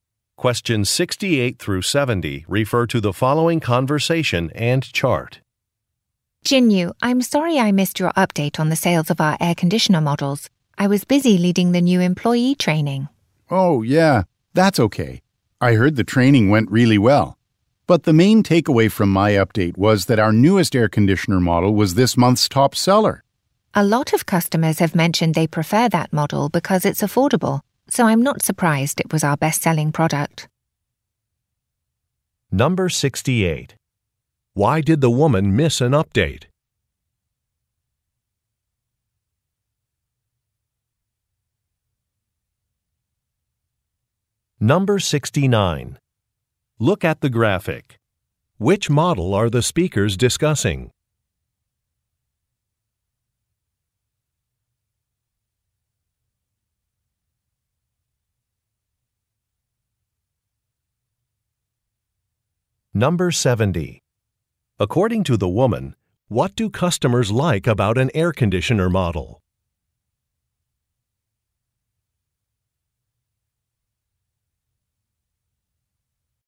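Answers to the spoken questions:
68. She was busy leading the new employee training.
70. It's affordable.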